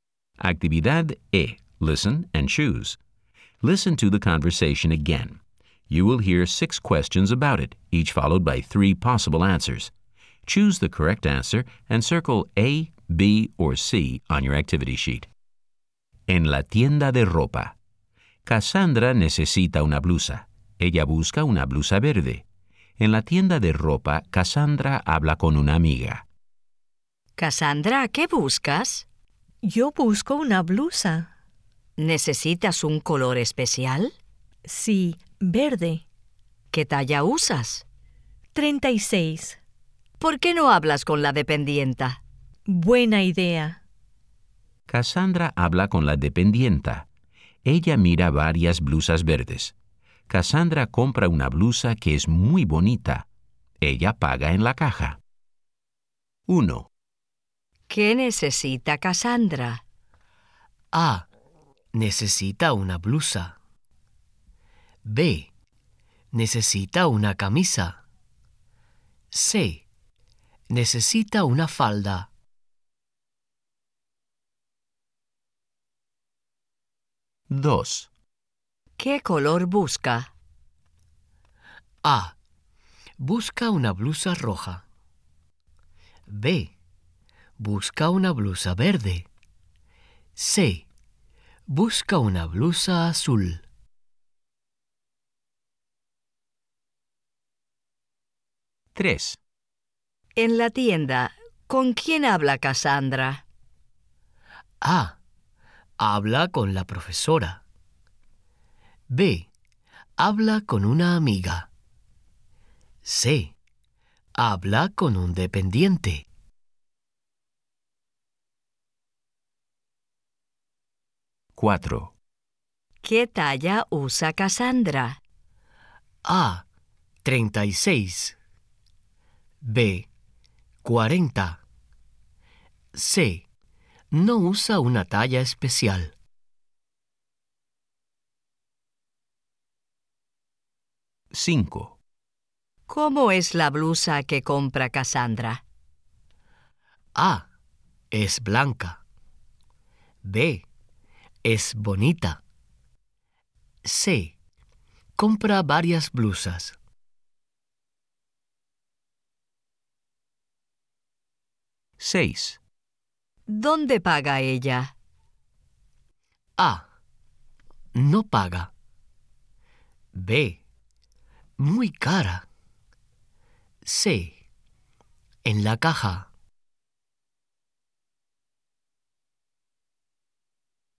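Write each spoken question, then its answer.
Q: ¿Qué necesita Cassandra?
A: A: Necesita una blusa.

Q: ¿Qué color busca?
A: B: Busca una blusa verde.

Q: En la tienda, ¿con quién habla Cassandra?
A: B: Habla con una amiga.

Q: ¿Qué talla usa Cassandra?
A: A: 36.

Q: ¿Cómo es la blusa que compra Cassandra?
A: B: Es bonita.

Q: ¿Dónde paga ella?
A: C: En la caja.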